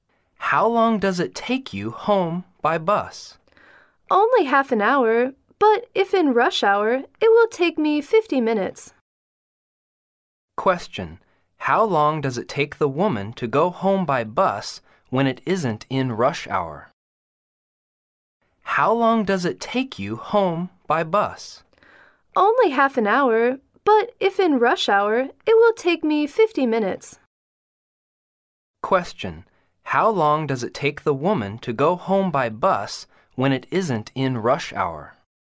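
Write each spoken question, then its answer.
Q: how long does it take the woman to go home by bus when it isn't in rush hour?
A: Half an hour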